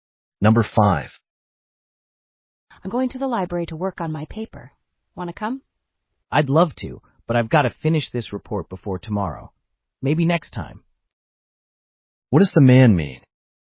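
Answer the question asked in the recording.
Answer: He can't come because he must finish a report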